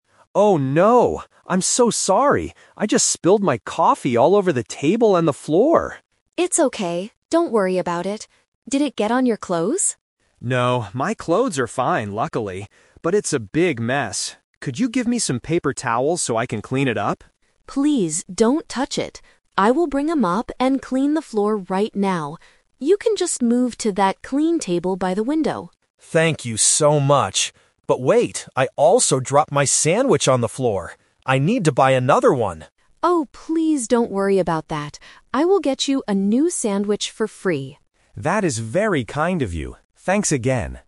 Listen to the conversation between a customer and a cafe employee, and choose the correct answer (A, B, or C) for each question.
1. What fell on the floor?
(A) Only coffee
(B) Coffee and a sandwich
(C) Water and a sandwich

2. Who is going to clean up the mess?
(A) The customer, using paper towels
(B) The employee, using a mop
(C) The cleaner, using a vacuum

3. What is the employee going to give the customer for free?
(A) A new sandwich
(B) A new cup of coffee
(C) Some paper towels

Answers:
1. Coffee and a sandwich
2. The employee, using a mop
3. A new sandwich

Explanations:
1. The customer spills his coffee at the beginning, and later says, "I also dropped my sandwich on the floor!" Option (A) is a trap; coffee was the first thing mentioned, but it was not the only thing. Option (C) is a trap; water is a plausible drink but is not mentioned in the audio.
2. The employee tells the customer, "I will bring a mop and clean the floor right now." Option (A) is the trap; the customer asks for paper towels to clean it himself, but the employee tells him not to touch it. Option (C) is plausible for a restaurant, but a separate cleaner is not mentioned.
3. When the customer says he needs to buy another sandwich, the employee replies, "I will get you a new sandwich for free." Option (B) is a trap; coffee was spilled, so it is plausible he needs a new one, but the employee explicitly offers the sandwich. Option (C) is a trap using words mentioned earlier in the conversation.

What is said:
Customer: Oh no! I'm so sorry! I just spilled my coffee all over the table and the floor.
Employee: It's okay, don't worry about it. Did it get on your clothes?
Customer: No, my clothes are fine, luckily. But it's a big mess. Could you give me some paper towels so I can clean it up?
Employee: Please don't touch it. I will bring a mop and clean the floor right now. You can just move to that clean table by the window.
Customer: Thank you so much. But wait, I also dropped my sandwich on the floor! I need to buy another one.
Employee: Oh, please don't worry about that. I will get you a new sandwich for free.

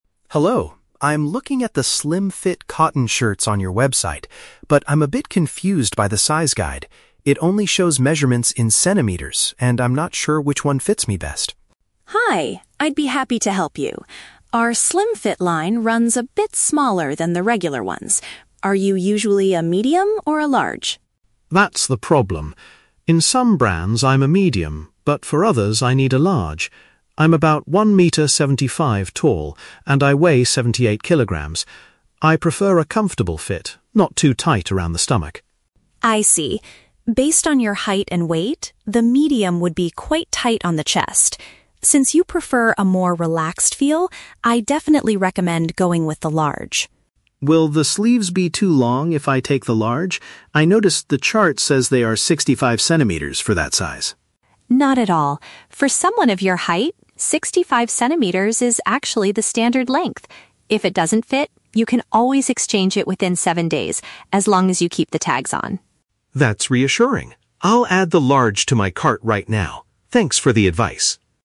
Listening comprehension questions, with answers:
Listen to a conversation between a customer and a shop owner. Choose the best answer (A, B, or C) for each question.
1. Why is the customer contacting the shop owner?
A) To complain that the shirt he bought is too small for him.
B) To ask for help because the online size chart is difficult to understand.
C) To request a custom-made shirt based on his own measurements.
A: To ask for help because the online size chart is difficult to understand.

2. What does the shop owner say about the "slim-fit" shirts?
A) They are generally larger than the shop's standard shirts.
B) They are made of a special material that does not stretch.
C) They have a tighter fit compared to regular shirt styles.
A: They have a tighter fit compared to regular shirt styles.

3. Why does the owner suggest the Large size for the customer?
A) Because the customer wants a shirt that is not too tight.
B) Because the Medium size is currently out of stock.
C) Because the sleeves on the Large size are shorter than 60 centimeters.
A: Because the customer wants a shirt that is not too tight.

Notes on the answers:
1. The customer says, "I'm a bit confused by the size guide" and asks for advice. Option B paraphrases this as the chart being "difficult to understand."
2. The owner states, "Our slim-fit line runs a bit smaller than the regular ones." Option C uses synonyms: "tighter fit" (smaller) and "regular shirt styles."
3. The customer says he prefers a "comfortable fit, not too tight," and the owner responds that "Medium would be quite tight... I definitely recommend going with the Large." Option A paraphrases this perfectly.

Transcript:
Customer: Hello! I'm looking at the slim-fit cotton shirts on your website, but I'm a bit confused by the size guide. It only shows measurements in centimeters, and I'm not sure which one fits me best.
Shop Owner: Hi! I'd be happy to help you. Our slim-fit line runs a bit smaller than the regular ones. Are you usually a medium or a large?
Customer: That's the problem. In some brands, I'm a Medium, but for others, I need a Large. I'm about 1 meter 75 tall and I weigh 78 kilograms. I prefer a comfortable fit, not too tight around the stomach.
Shop Owner: I see. Based on your height and weight, the Medium would be quite tight on the chest. Since you prefer a more relaxed feel, I definitely recommend going with the Large.
Customer: Will the sleeves be too long if I take the Large? I noticed the chart says they are 65 centimeters for that size.
Shop Owner: Not at all. For someone of your height, 65 centimeters is actually the standard length. If it doesn't fit, you can always exchange it within seven days, as long as you keep the tags on.
Customer: That's reassuring. I'll add the Large to my cart right now. Thanks for the advice!

